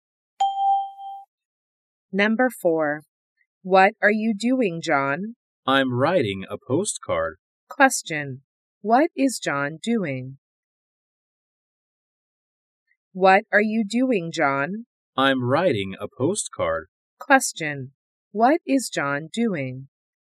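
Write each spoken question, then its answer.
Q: What is John doing?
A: He is writing a postcard.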